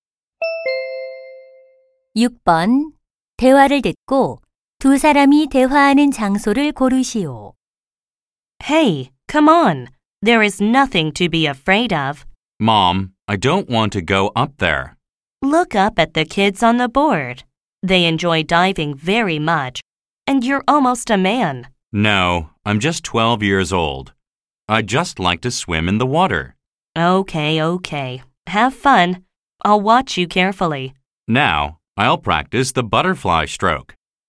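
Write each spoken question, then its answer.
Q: 대화를 듣고 두 사람이 대화하는 장소를 고르시오.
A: 수영장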